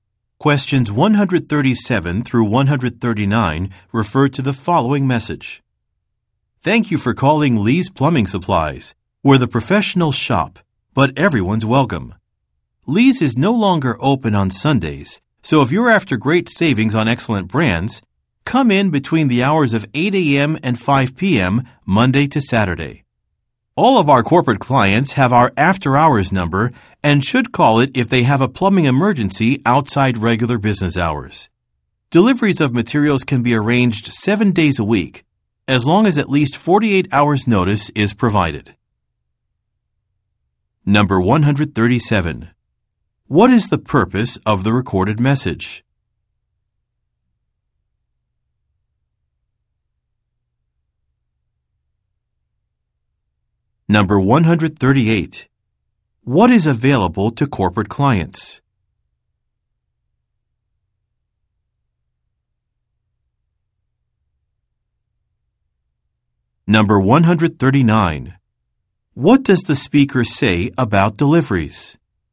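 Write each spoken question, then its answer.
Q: What is the purpose of the recorded message?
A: To give business hours and service information for Lee's Plumbing Supplies

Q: What is available to corporate clients?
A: An after-hours number for plumbing emergencies

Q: What does the speaker say about deliveries?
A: They are available 7 days a week with at least 48 hours' notice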